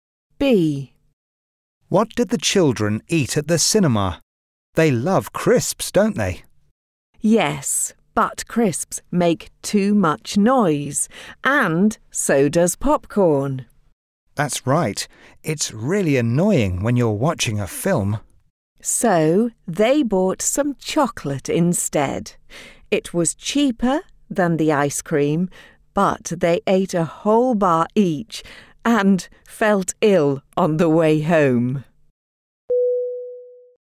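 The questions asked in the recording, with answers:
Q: What did the children eat at the cinema?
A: Chocolate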